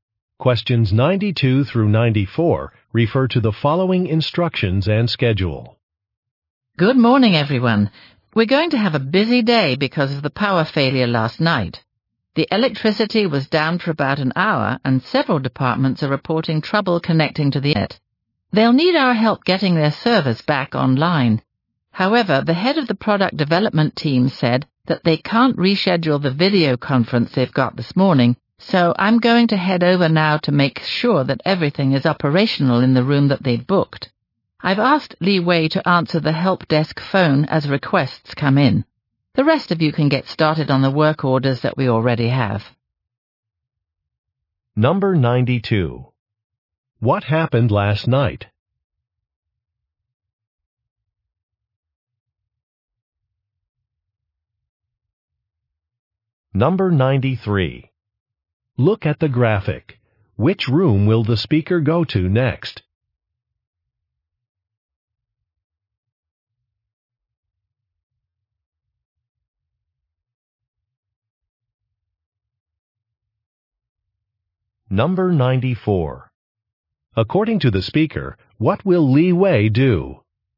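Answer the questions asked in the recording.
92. There was a power failure
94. Answer the help desk phone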